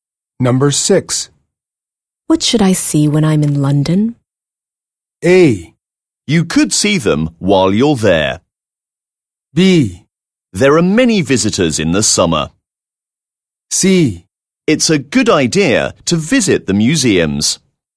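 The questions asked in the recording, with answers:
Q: What should I see when I'm in London?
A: C: It's a good idea to visit the museums.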